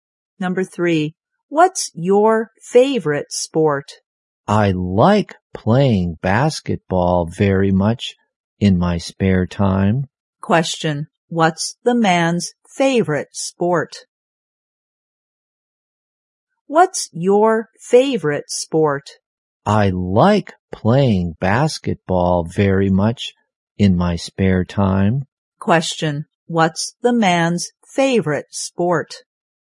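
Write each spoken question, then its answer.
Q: what's the man's favorite sport?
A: Basketball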